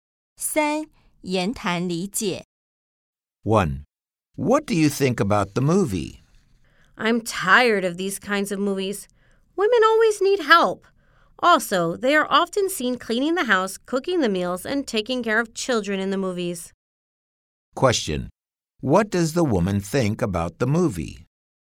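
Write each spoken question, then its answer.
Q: What does the woman think about the movie?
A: She is tired of these kinds of movies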